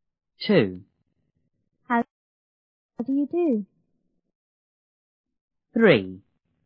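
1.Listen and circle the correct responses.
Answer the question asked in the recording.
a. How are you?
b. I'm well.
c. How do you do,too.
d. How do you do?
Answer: d. How do you do?

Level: 初中英语广州版1B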